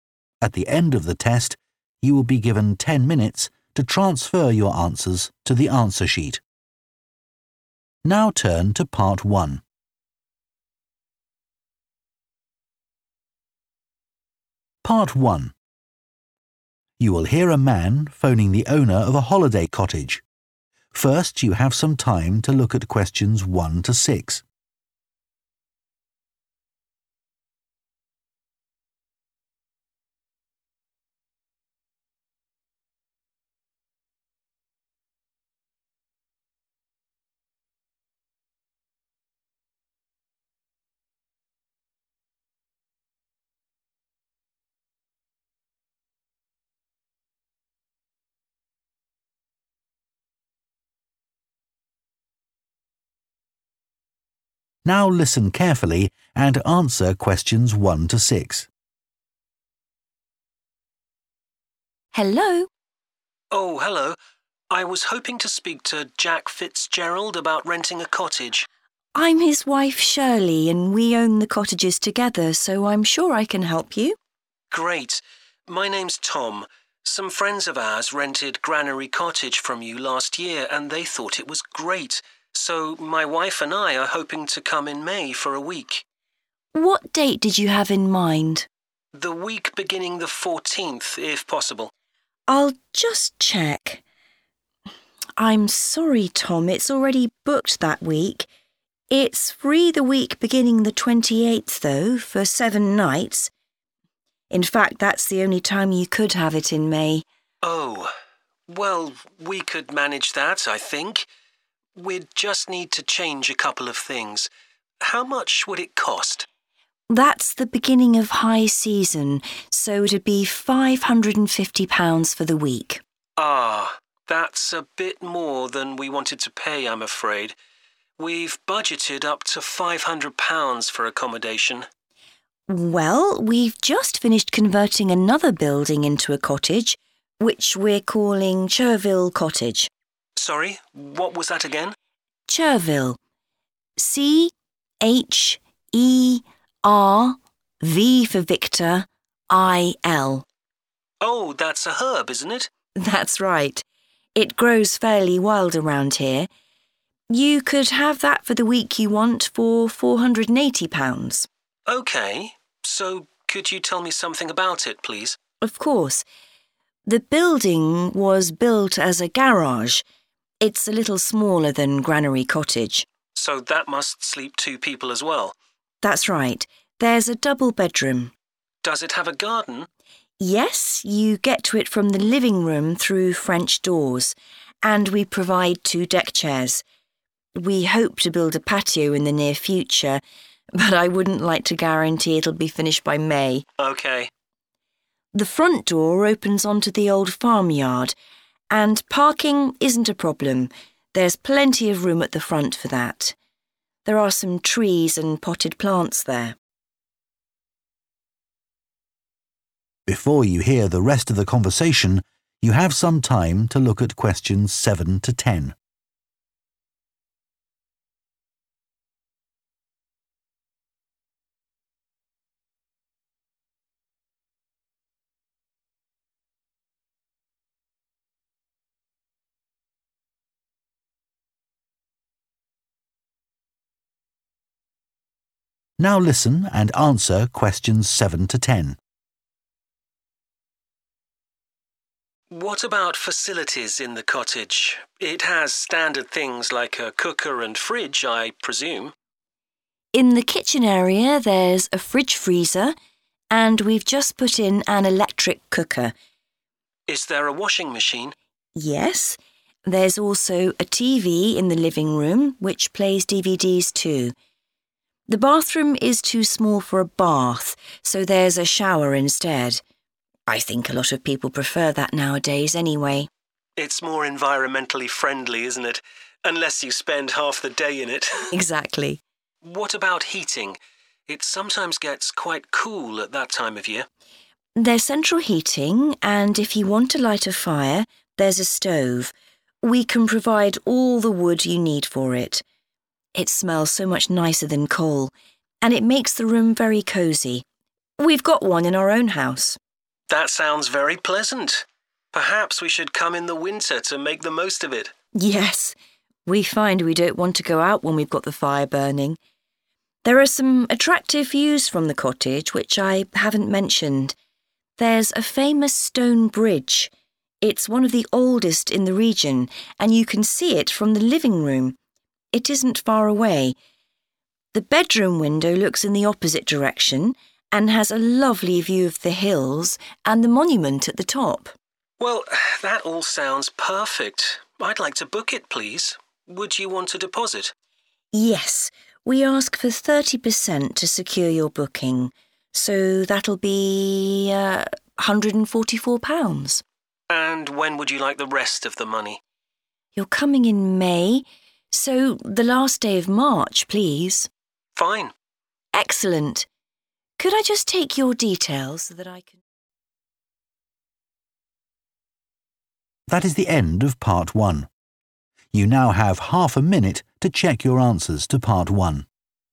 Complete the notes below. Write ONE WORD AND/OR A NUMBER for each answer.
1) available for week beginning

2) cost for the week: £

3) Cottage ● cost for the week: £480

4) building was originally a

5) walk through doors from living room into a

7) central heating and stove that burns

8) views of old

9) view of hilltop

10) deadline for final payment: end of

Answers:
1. 28th
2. 550
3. Chervil
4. garage
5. garden
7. wood
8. bridge
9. monument
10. March

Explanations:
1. [Nó có chỗ trống tuần này bắt đầu từ ngày 28]
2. [nó sẽ là £ 550 trong tuần]
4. [Tòa nhà được xây dựng như một nhà để xe]
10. (đáp án gây nhiễu – đây là thời gian Tom sẽ tới, không phải thời hạn thanh toán tiền)

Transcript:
SHIRLEY: Hello?
TOM: Oh hello. I was hoping to speak to Jack Fitzgerald about renting a cottage.
SHIRLEY: I'm his wife, Shirley, and we own the cottages together, so I'm sure I can help you.
TOM: Great. My name's Tom. Some friends of ours rented Granary Cottage from you last year, and they thought it was great. So my wife and I are hoping to come in May for a week.
SHIRLEY: What date did you have in mind?
TOM: The week beginning the 14th, if possible.
SHIRLEY: I'll just check ... I'm sorry, Tom, it's already booked that week. In fact, that's the only time you could have it in May.
TOM: Oh. Well, we could manage that, I think. We'd just need to change a couple of things. How much would it cost?
SHIRLEY: That's the beginning of high season, so it'd be £550 for the week [nó sẽ là £ 550 trong tuần] (Question 2)
TOM: Ah. That's a bit more than we wanted to pay, I'm afraid. We've budgeted up to £500 for accommodation.
SHIRLEY: Well, we've just finished converting another building into a cottage, which we're calling Chervil Cottage.
TOM: Sorry? What was that again?
SHIRLEY: Chervil. C-H-E-R-V for Victor I-L.(Question 3)
TOM: Oh, that's a herb, isn't it?
SHIRLEY: That's right. It grows fairly wild around here. You could have that for the week you want for £480.
TOM: OK. So could you tell me something about it, please?
SHIRLEY: Of course. It's a little smaller than Granary Cottage.
TOM: So that must sleep two people, as well?
SHIRLEY: That's right. There's a double bedroom.
TOM: Does it have a garden?
– Có] (Question 5), you get to it from the living room through French doors, and we provide two deckchairs. We hope to build a patio in the near future, but I wouldn't like to guarantee it'll be finished by May.
TOM: OK.
SHIRLEY: The front door opens onto the old farmyard, and parking isn't a problem – there's plenty of room at the front for that [đậu xe không phải là một vấn đề – có rất nhiều chỗ ở phía trước cho điều đó] (Question 6). There are some trees and potted plants there.
TOM: What about facilities in the cottage? It has standard things like a cooker and fridge, I presume.
SHIRLEY: In the kitchen area there's a fridge-freezer and we've just put in an electric cooker.
TOM: Is there a washing machine?
SHIRLEY: Yes. There's also a TV in the living room, which plays DVDs too. The bathroom is too small for a bath, so there's a shower instead. I think a lot of people prefer that nowadays, anyway.
TOM: It's more environmentally friendly, isn't it? Unless you spend half the day in it!
SHIRLEY: Exactly.
TOM: What about heating? It sometimes gets quite cool at that time of year.
SHIRLEY: There's central heating, and if you want to light a fire, there's a stove. We can provide all the wood you need for it [có một cái bếp. It smells so much nicer than coal, and it makes the room very cosy – we've got one in our own house.
TOM: That sounds very pleasant. Perhaps we should come in the winter, to make the most of it!
SHIRLEY: Yes, we find we don't want to go out when we've got the fire burning. There are some attractive views from the cottage, which I haven't mentioned.